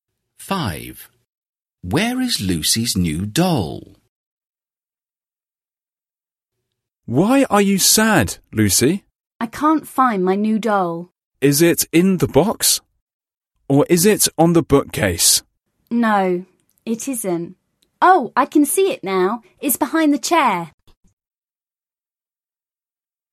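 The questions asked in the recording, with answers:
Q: Where is Lucy's new doll?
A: behind the chair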